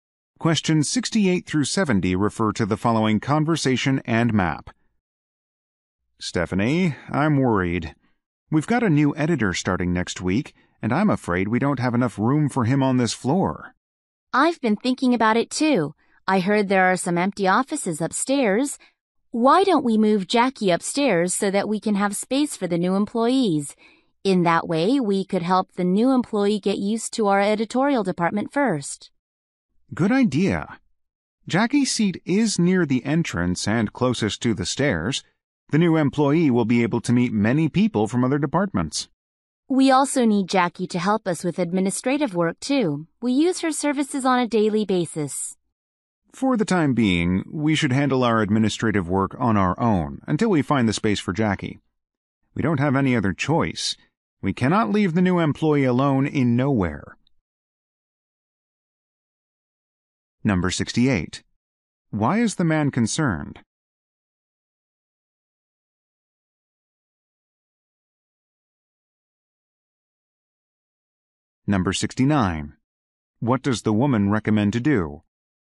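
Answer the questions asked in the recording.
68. There isn't enough room on the floor for the new editor
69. Move Jackie upstairs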